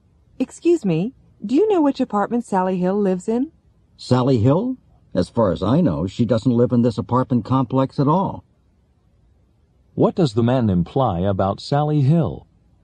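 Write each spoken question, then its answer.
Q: What does the man imply about Sally Hill?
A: She doesn't live in this apartment complex.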